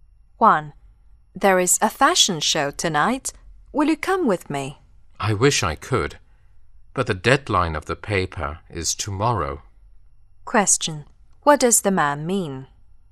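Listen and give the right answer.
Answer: He can't go because his paper is due tomorrow.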